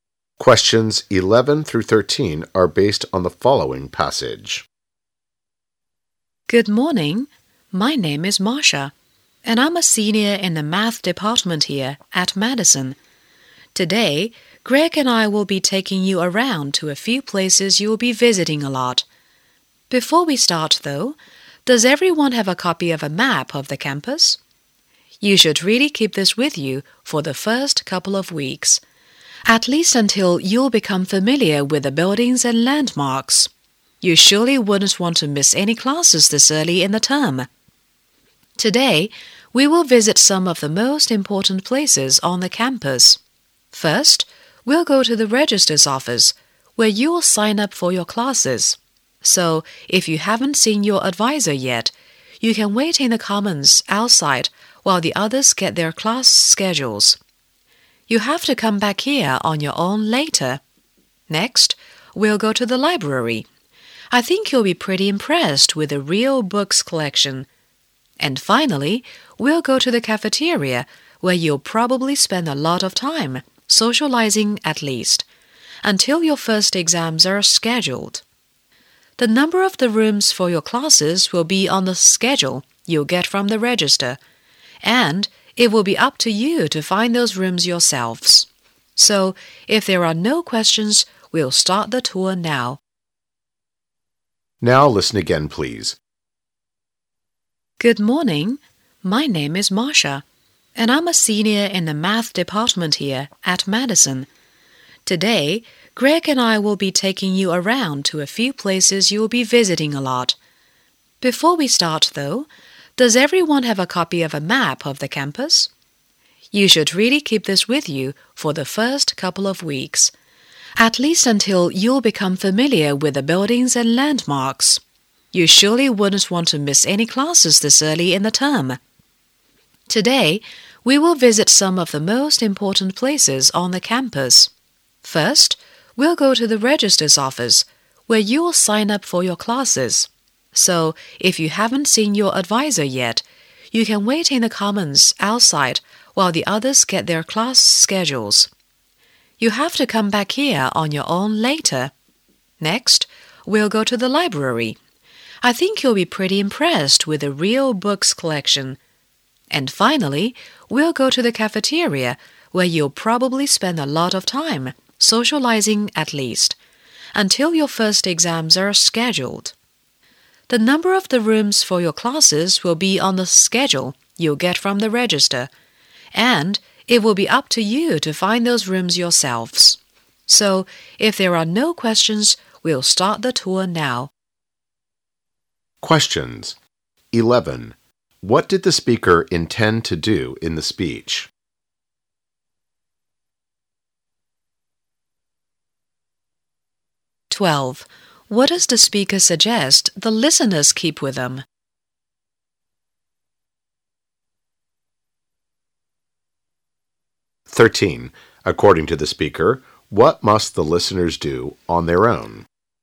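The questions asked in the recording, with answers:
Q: What did the speaker intend to do in the speech?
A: Show new students around the campus

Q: What does the speaker suggest the listeners keep with them?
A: A map of the campus

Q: According to the speaker, what must the listeners do on their own?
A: Find their classrooms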